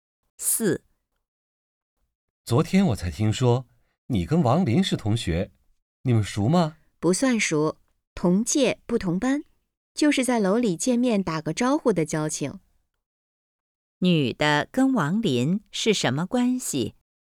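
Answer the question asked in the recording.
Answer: 同届不同班的同学,见面打招呼,不太熟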